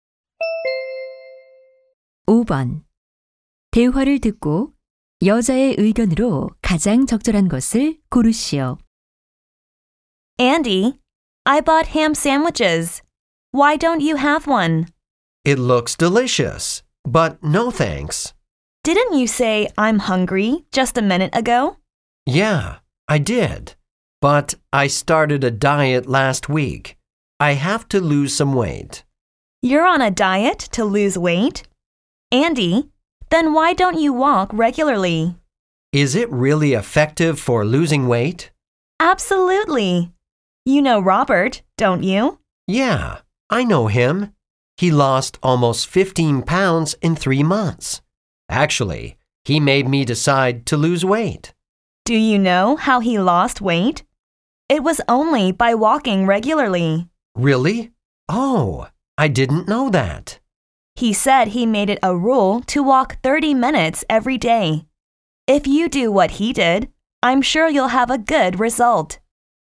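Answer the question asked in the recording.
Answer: 살을 빼려면 규칙적으로 걷는 것이 효과적이다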